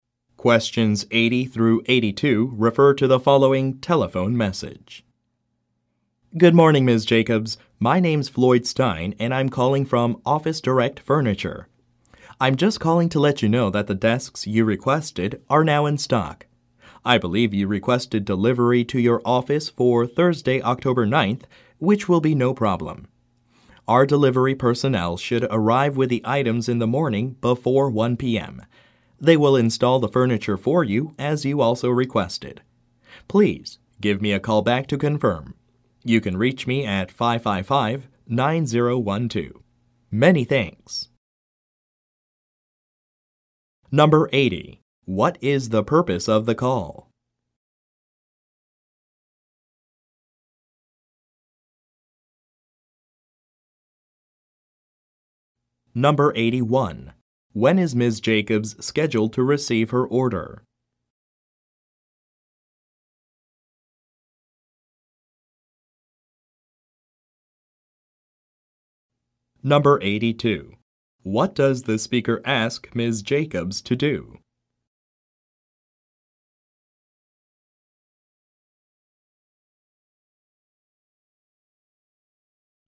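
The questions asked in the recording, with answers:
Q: What is the purpose of the call?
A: To say that the desks she requested are now in stock

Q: When is Ms. Jacobs scheduled to receive her order?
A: Thursday, October 9th, in the morning

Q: What does the speaker ask Ms. Jacobs to do?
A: Call him back to confirm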